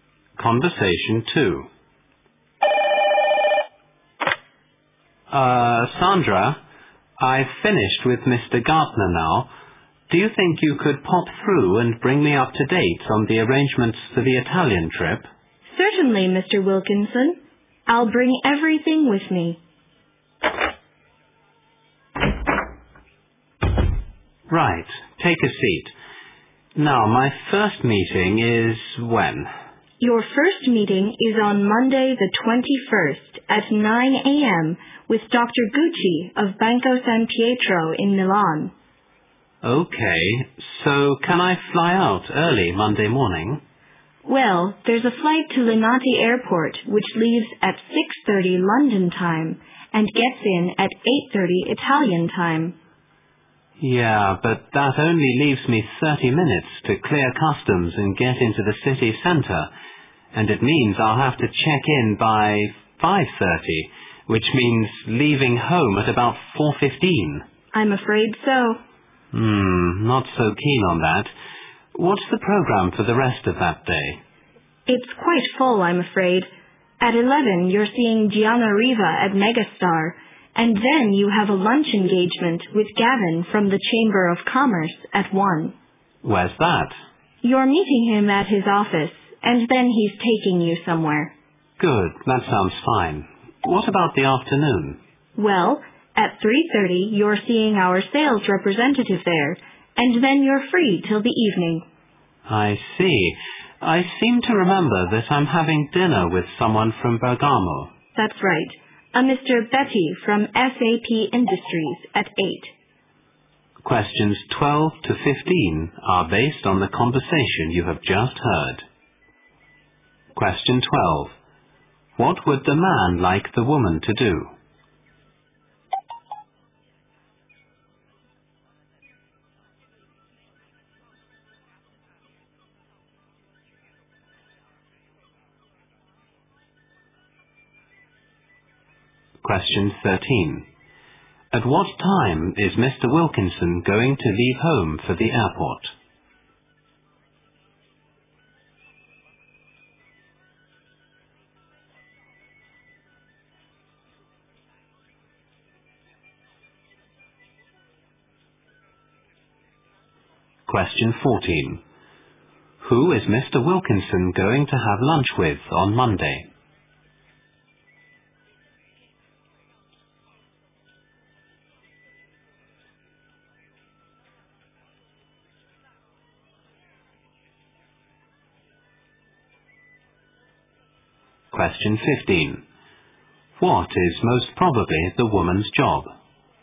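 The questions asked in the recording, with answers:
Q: What would the man like the woman to do?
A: Update him on the arrangements for the Italian trip

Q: At what time is Mr. Wilkinson going to leave home for the airport?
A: At about 4:15

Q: Who is Mr. Wilkinson going to have lunch with on Monday?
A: Gavin from the Chamber of Commerce

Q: What is most probably the woman's job?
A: Secretary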